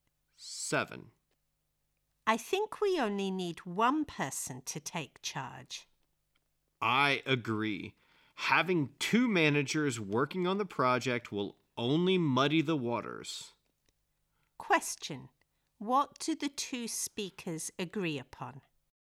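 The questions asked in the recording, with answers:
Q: What do the two speakers agree upon?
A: Only one person should manage the project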